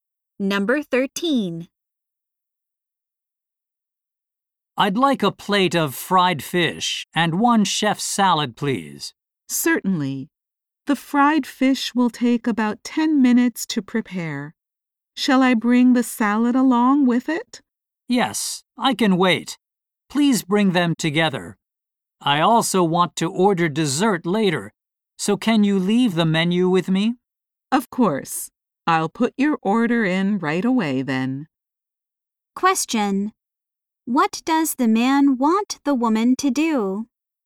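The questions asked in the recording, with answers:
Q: What does the man want the woman to do?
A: Bring the fish and salad together and leave the menu with him.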